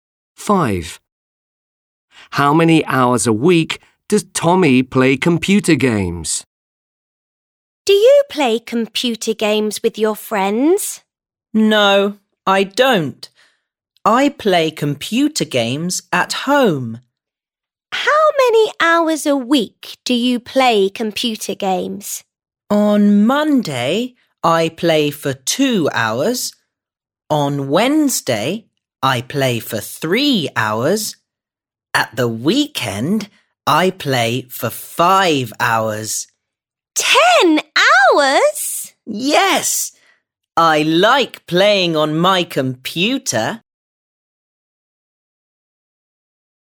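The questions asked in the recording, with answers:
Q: How many hours a week does Tommy play computer games?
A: 10 hours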